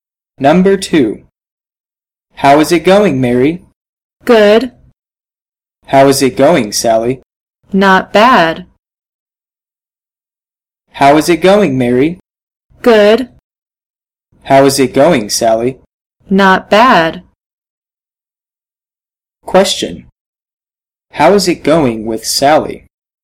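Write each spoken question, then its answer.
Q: How is it going with Sally?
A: Not bad.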